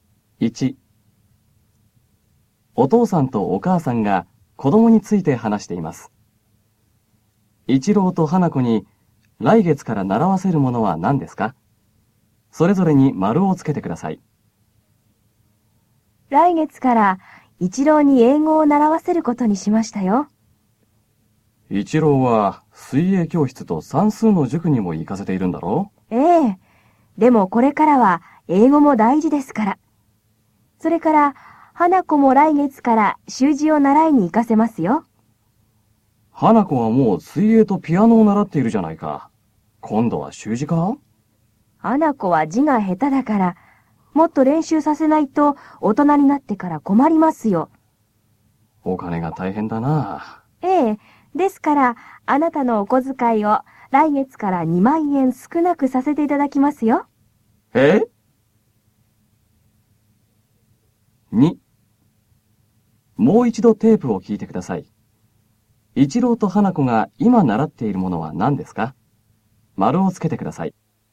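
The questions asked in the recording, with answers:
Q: 一郎と花子に来月から習わせるものは何ですか?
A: 一郎は英語、花子は習字

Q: 一郎と花子が今習っているものは何ですか?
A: 一郎は水泳と算数の塾、花子は水泳とピアノ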